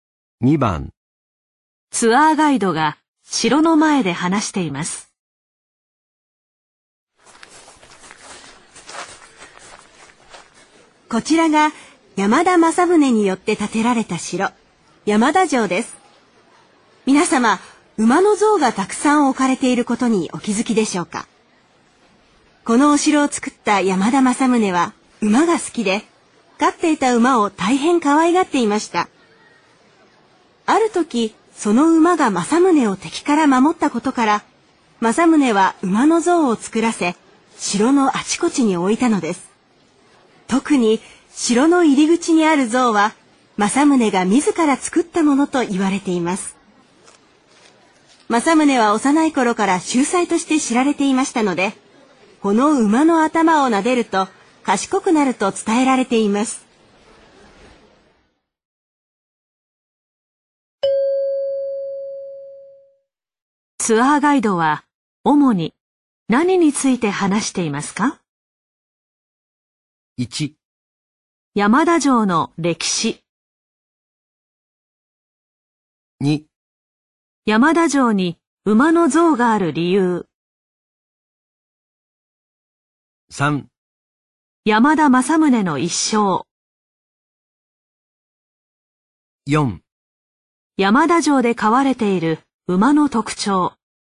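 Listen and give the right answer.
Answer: 2: 山田城に馬の像がある理由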